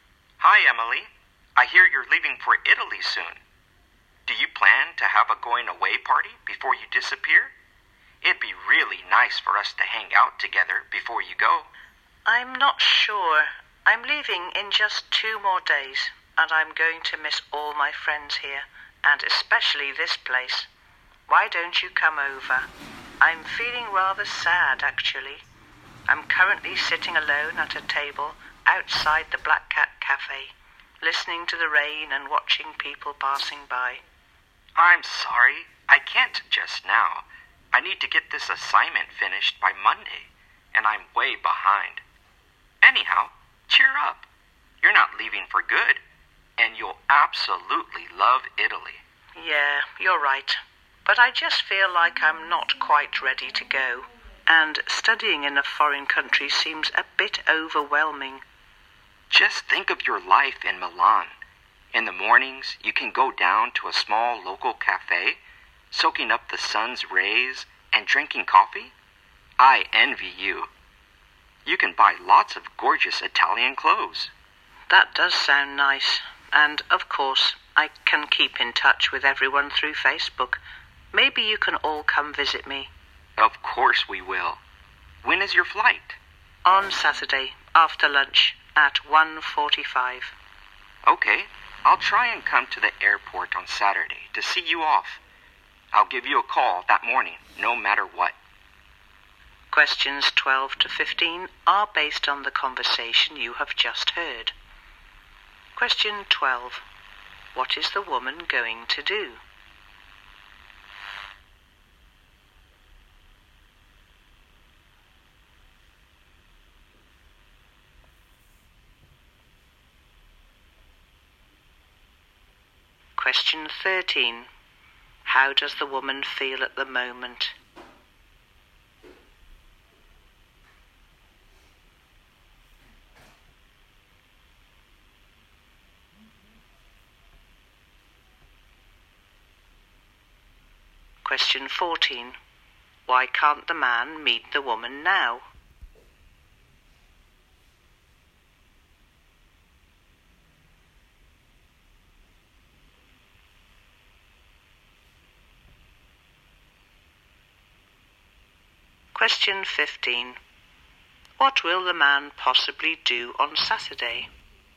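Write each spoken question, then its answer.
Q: What is the woman going to do?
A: Go to study in Italy (Milan).

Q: How does the woman feel at the moment?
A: Sad.

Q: Why can't the man meet the woman now?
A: He has to finish an assignment by Monday.

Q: What will the man possibly do on Saturday?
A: Go to the airport to see her off.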